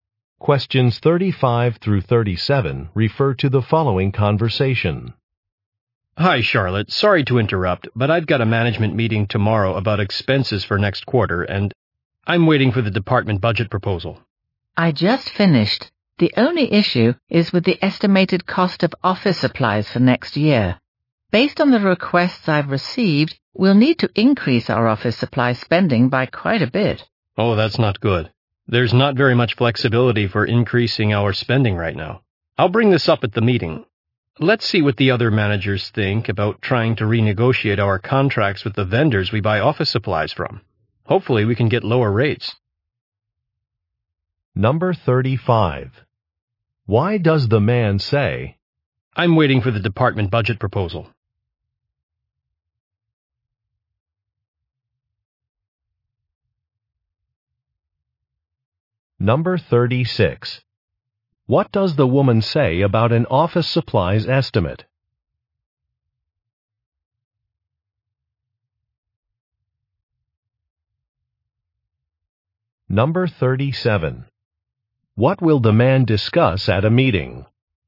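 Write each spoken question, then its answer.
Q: What does the woman say about an office supplies estimate?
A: Office supply spending will need to increase quite a bit

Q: What will the man discuss at a meeting?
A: Renegotiating contracts with office supply vendors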